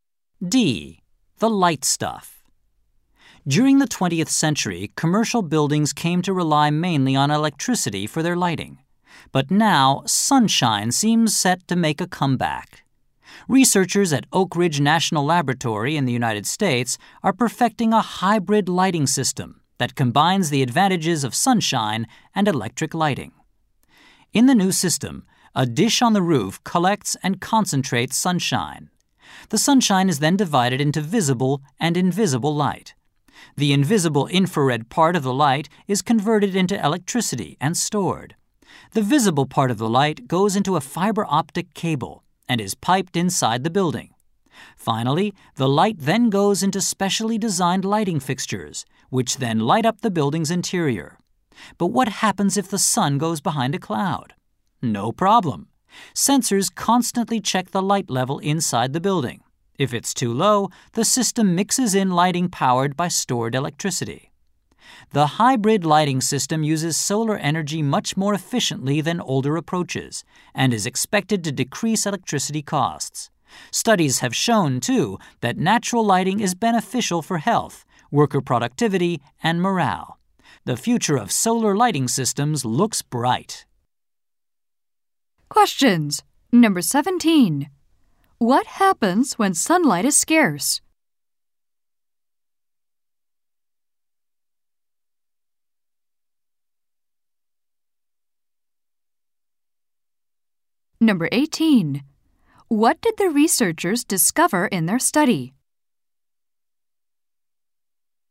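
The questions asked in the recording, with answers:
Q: What happens when sunlight is scarce?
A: The system adds lighting powered by stored electricity.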